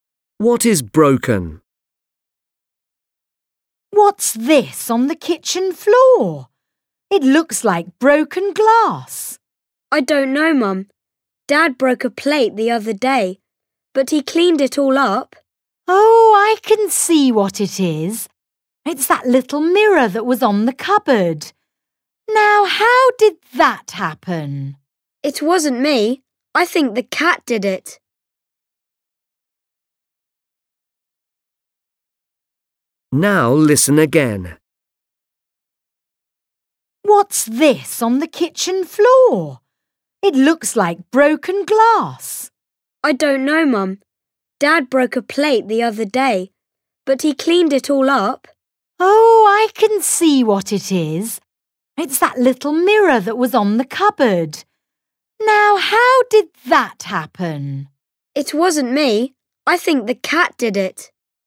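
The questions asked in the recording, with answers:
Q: What is broken?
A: The little mirror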